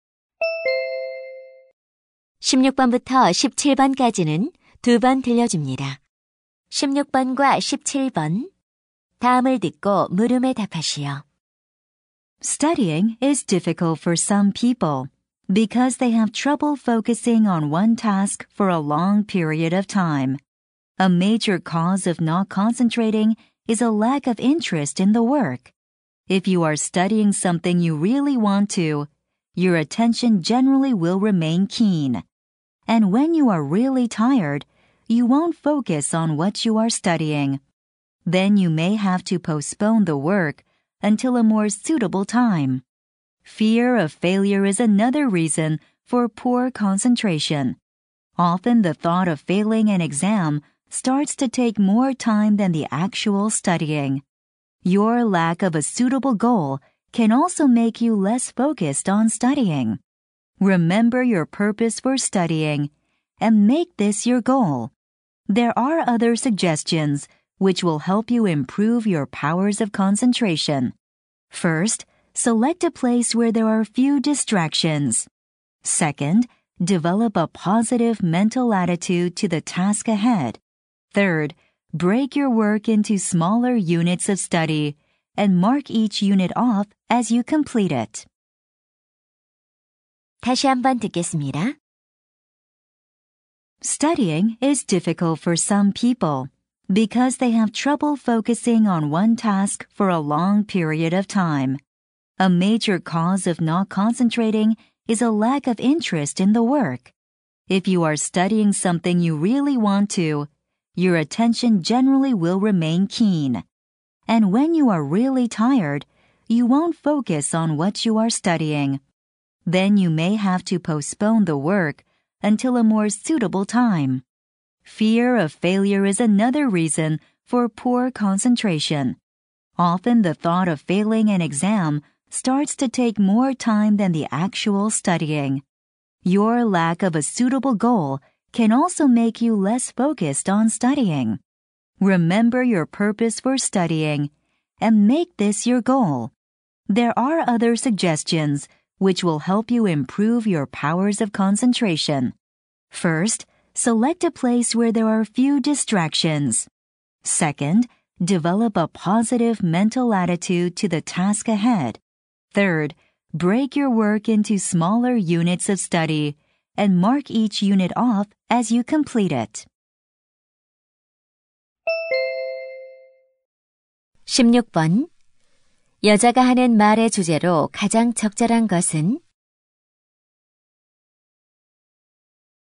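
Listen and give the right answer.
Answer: 공부할 때 집중이 안 되는 원인과 집중력을 높이는 방법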